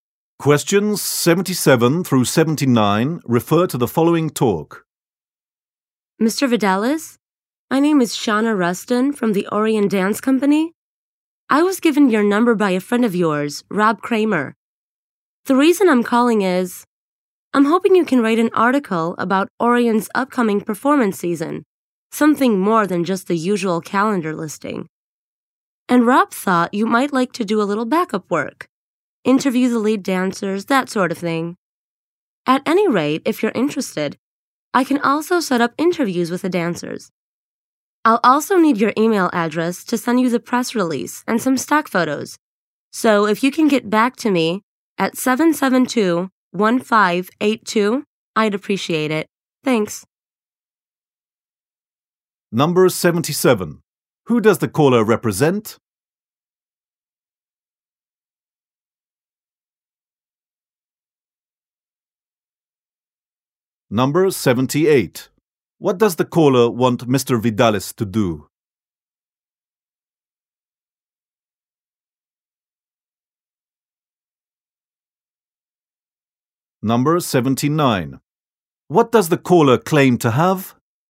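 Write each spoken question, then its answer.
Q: Who does the caller represent?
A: The Orion Dance Company

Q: What does the caller want Mr.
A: Write an article about the upcoming performance season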